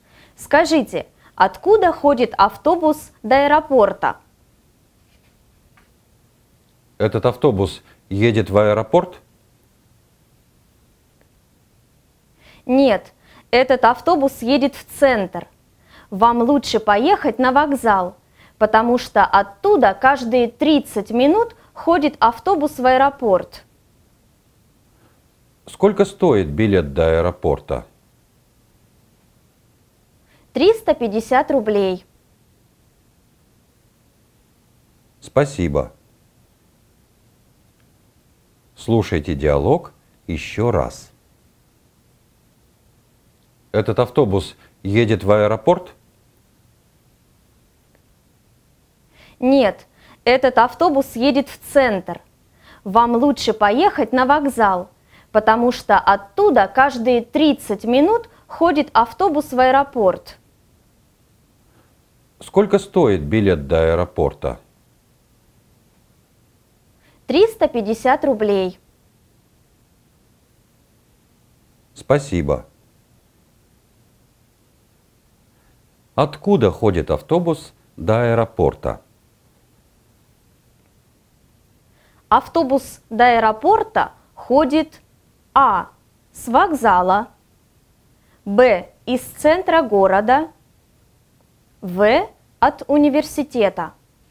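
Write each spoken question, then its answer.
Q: Откуда ходит автобус до аэропорта?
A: А: С вокзала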